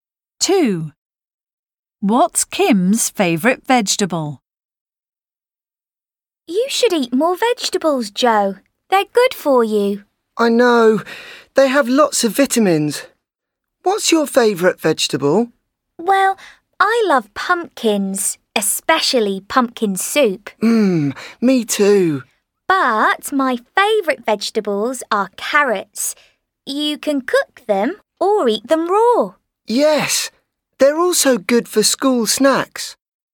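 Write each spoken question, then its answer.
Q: What's Kim's favourite vegetable?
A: carrots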